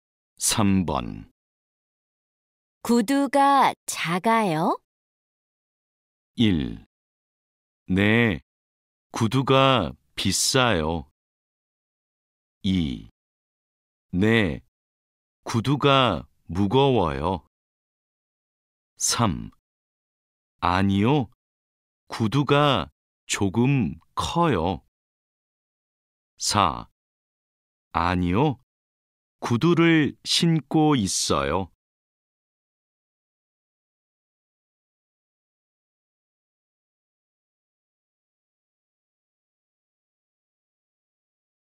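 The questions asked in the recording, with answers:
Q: 구두가 작아요?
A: 3: 아니요, 구두가 조금 커요.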